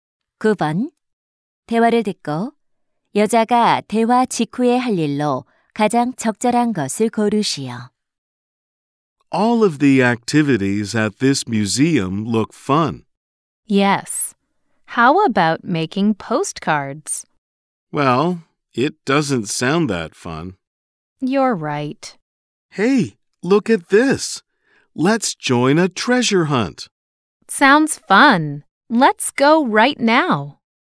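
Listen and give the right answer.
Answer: 보물찾기에 참여하기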